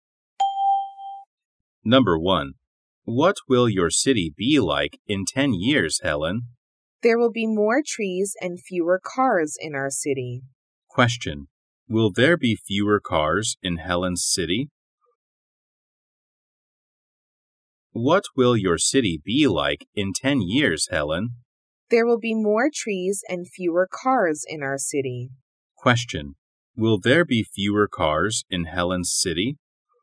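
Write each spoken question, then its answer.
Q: Will there be fewer cars in Helen's city?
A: Yes, there will.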